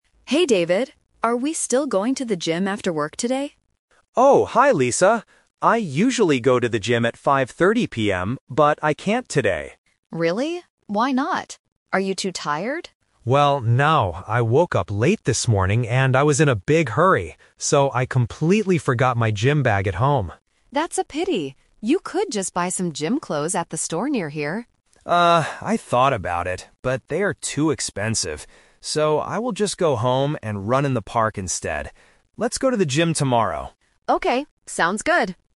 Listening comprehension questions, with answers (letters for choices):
Listen to the conversation and choose the correct answer (A, B, or C).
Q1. What does David usually do at 5:30 PM?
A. Go home to sleep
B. Go to the gym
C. Run in the park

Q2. Why can't David go to the gym today?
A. He is too tired after work.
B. He has to buy new clothes.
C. He forgot his gym bag at home.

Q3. What will David do after work today?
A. Buy some gym clothes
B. Run in the park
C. Go to the gym with Lisa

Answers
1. B
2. C
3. B

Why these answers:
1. David clearly says, "I usually go to the gym at 5:30 PM." Option C (Run in the park) is a trap because that is what he will do today, not his usual habit. Option A is not mentioned.
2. David says, "So, I completely forgot my gym bag at home." Option A (He is too tired) is a trap because Lisa asks him this, but he says "no". Option B is a trap because buying clothes was Lisa's suggestion, not the reason he can't go.
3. David says, "So, I will just go home and run in the park instead." Option A (Buy some gym clothes) is a trap because he thought about it, but the clothes are too expensive. Option C is his old plan that he canceled.

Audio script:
Lisa: Hey, David. Are we still going to the gym after work today?
David: Oh, hi Lisa. I usually go to the gym at 5:30 PM, but I can't today.
Lisa: Really? Why not? Are you too tired?
David: Well, no. I woke up late this morning and I was in a big hurry. So, I completely forgot my gym bag at home.
Lisa: That's a pity. You could just buy some gym clothes at the store near here.
David: Ah, I thought about it, but they are too expensive. So, I will just go home and run in the park instead.